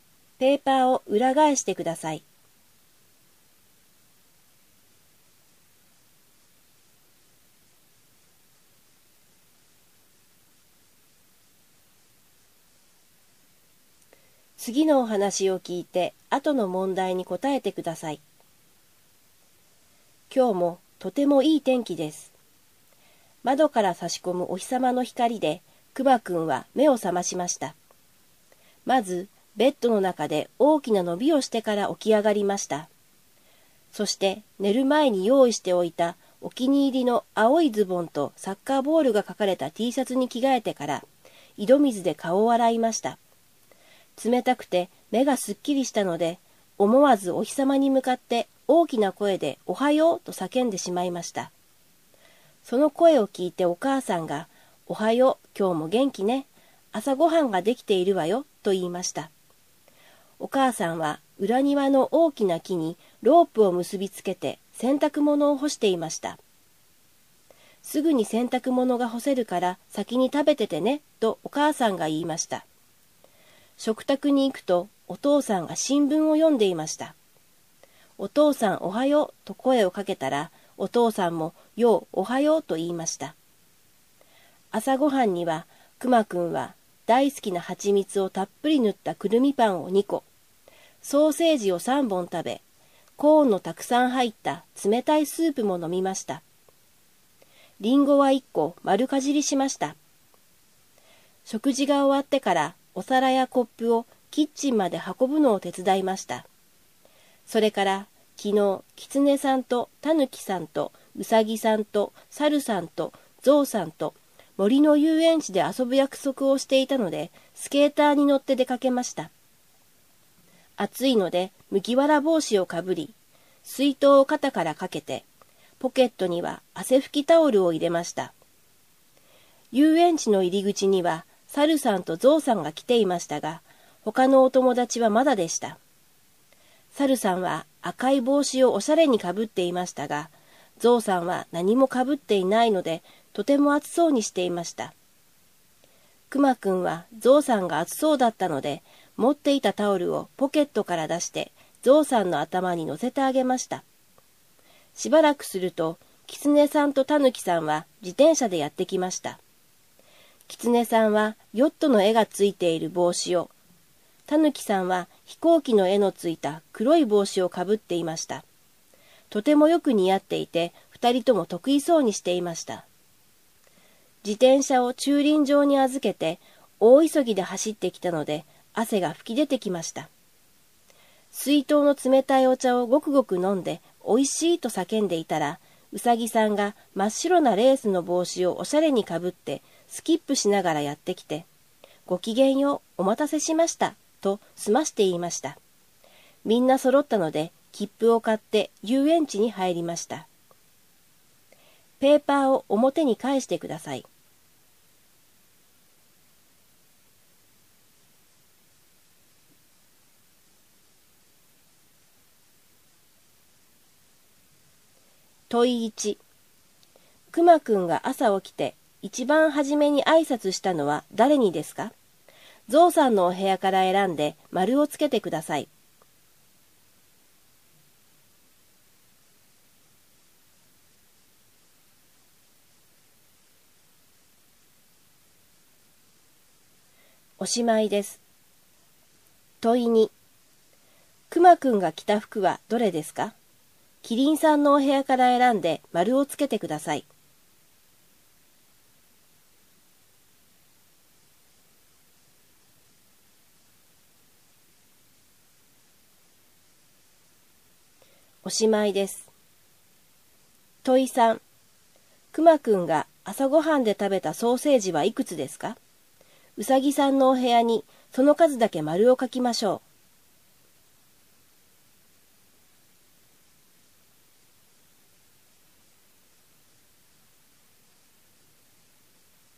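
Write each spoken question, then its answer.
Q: クマくんが朝起きて一番初めに挨拶したのは誰にですか?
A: お日様

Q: クマくんが朝ごはんで食べたソーセージはいくつですか?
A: 3本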